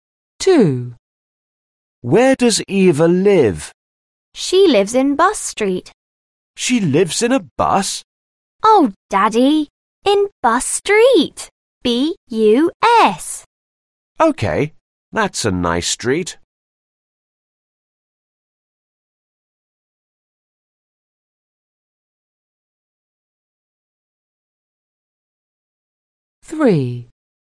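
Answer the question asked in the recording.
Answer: Bus Street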